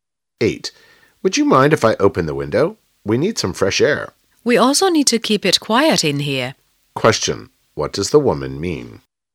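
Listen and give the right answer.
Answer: She doesn't want the window opened; they need quiet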